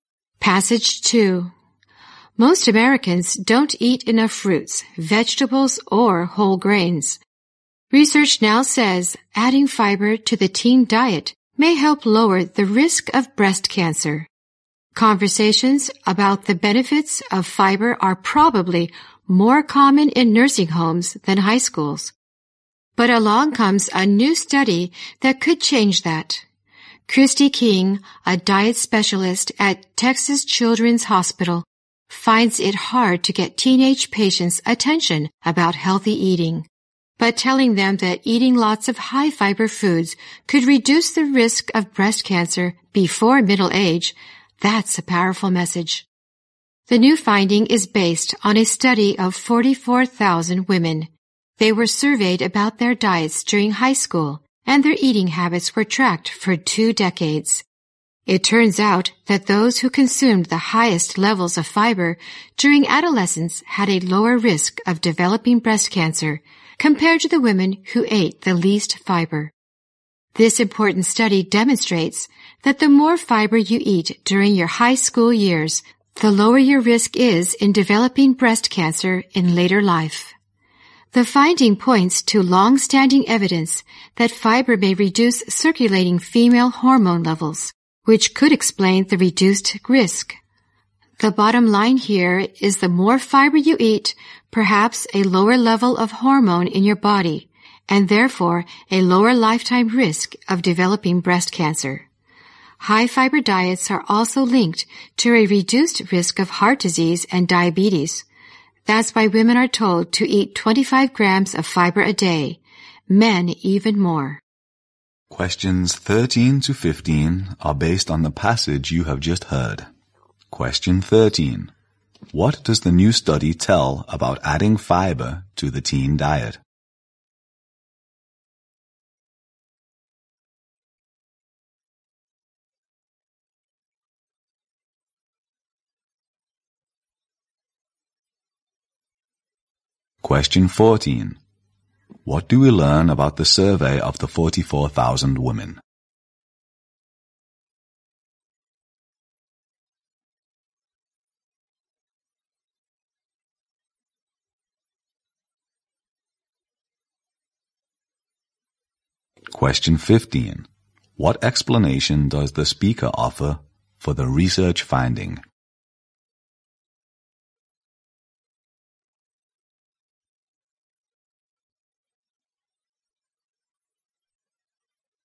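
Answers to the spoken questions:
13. It may help lower the risk of breast cancer
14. Their eating habits were tracked for two decades
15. Fiber may reduce circulating female hormone levels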